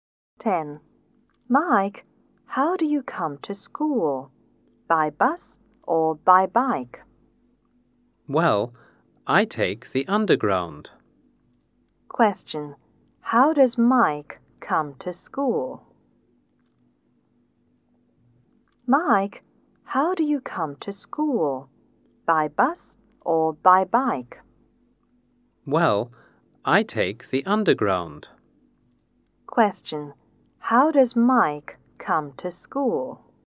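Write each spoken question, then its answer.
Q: How does Mike come to school?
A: By underground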